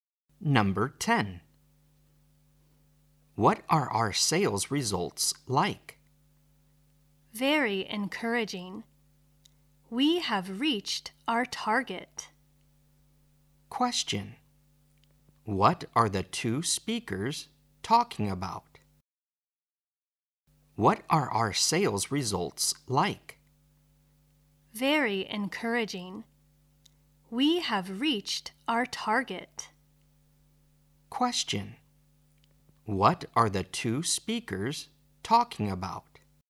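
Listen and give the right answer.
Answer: Sales results.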